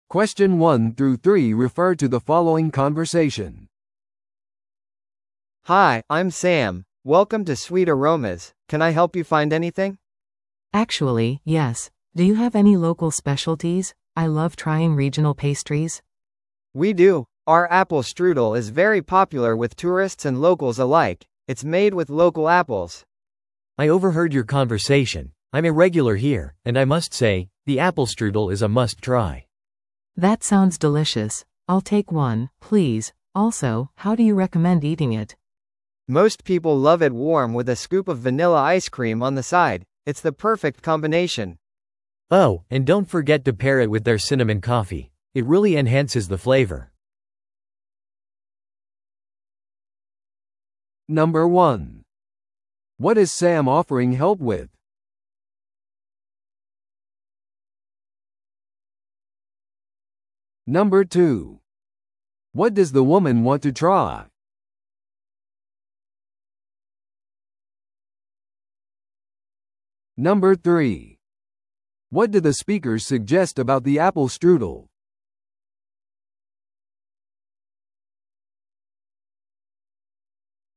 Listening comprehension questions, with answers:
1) What is Sam offering help with?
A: 地元の特産ペストリーの探索

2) What does the woman want to try?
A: ベーカリーで地域のペストリー

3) What do the speakers suggest about the apple strudel?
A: 特定のコーヒーと楽しむべき

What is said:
A: Hi, I'm Sam. Welcome to Sweet Aromas, can I help you find anything?
B: Actually, yes. Do you have any local specialties? I love trying regional pastries.
A: We do! Our apple strudel is very popular with tourists and locals alike. It's made with local apples.
C: I overheard your conversation. I'm a regular here, and I must say, the apple strudel is a must-try!
B: That sounds delicious. I'll take one, please. Also, how do you recommend eating it?
A: Most people love it warm with a scoop of vanilla ice cream on the side. It's the perfect combination!
C: Oh, and don't forget to pair it with their cinnamon coffee. It really enhances the flavor.